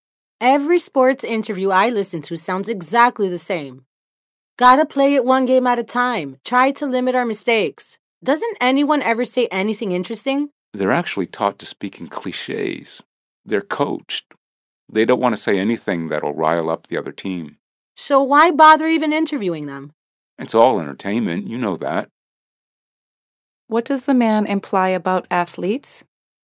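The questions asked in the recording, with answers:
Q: What does the man imply about athletes?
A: They are coached to speak in clichés so they don't say anything that would rile up the other team.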